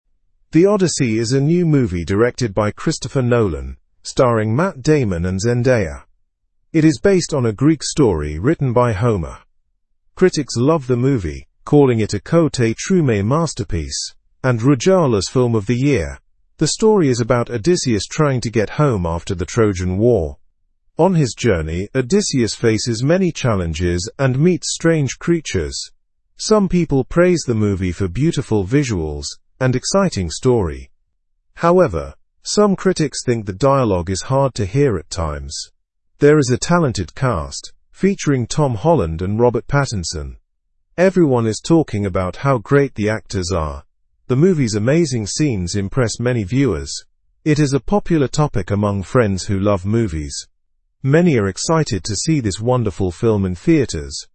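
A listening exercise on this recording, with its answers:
🎧✍️ Listen and Fill in the Gaps:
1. It is based on a Greek story ? by Homer.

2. The ? is about Odysseus trying to get home after the Trojan War.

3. On his journey, Odysseus faces many challenges and meets ? creatures.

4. The ? amazing scenes impress many viewers.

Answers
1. written
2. story
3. strange
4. movie's

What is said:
The Odyssey is a new movie directed by Christopher Nolan, starring Matt Damon and Zendaya. It is based on a Greek story written by Homer. Critics love the movie, calling it a 'masterpiece' and 'film of the year'. The story is about Odysseus trying to get home after the Trojan War. On his journey, Odysseus faces many challenges and meets strange creatures. Some people praise the movie for beautiful visuals and exciting story. However, some critics think the dialogue is hard to hear at times. There is a talented cast, featuring Tom Holland and Robert Pattinson. 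Everyone is talking about how great the actors are. The movie's amazing scenes impress many viewers. It is a popular topic among friends who love movies. Many are excited to see this wonderful film in theaters.

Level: Level 2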